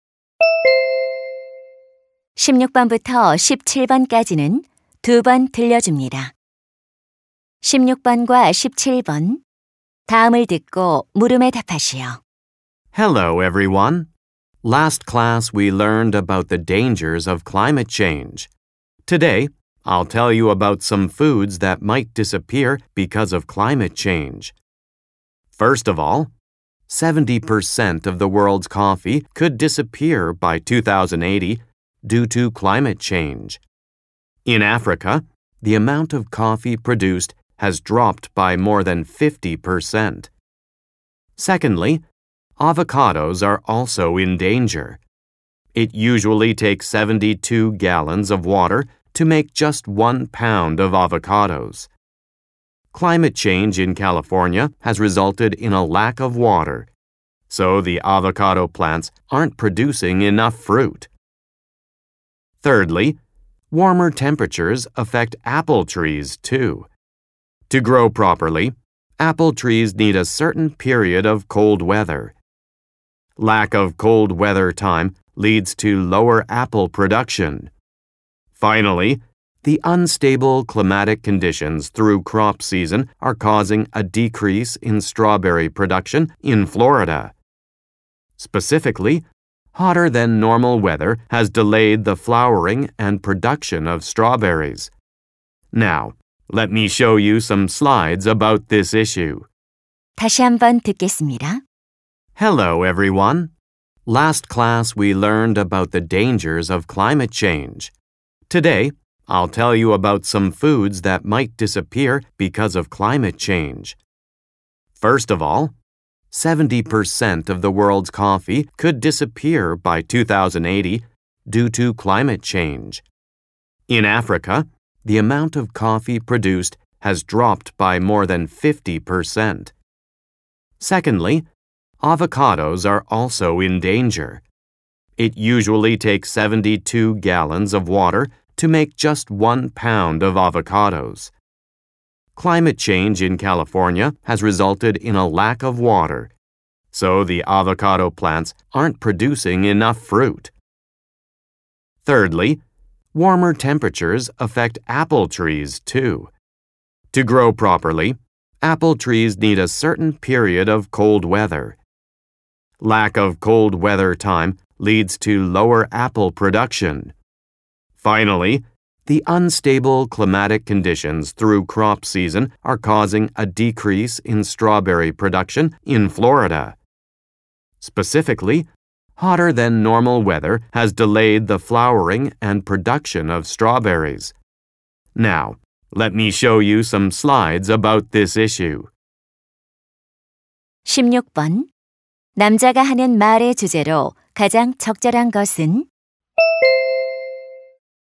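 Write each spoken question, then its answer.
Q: 남자가 하는 말의 주제로 가장 적절한 것은?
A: 기후 변화로 사라질 수 있는 음식들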